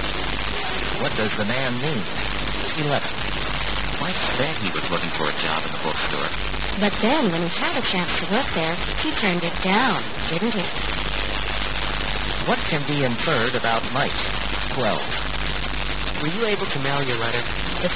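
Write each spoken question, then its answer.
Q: What can be inferred about Mike?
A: He turned down a bookstore job he had wanted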